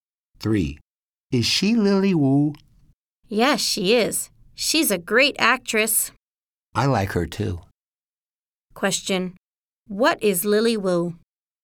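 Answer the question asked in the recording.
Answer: An actress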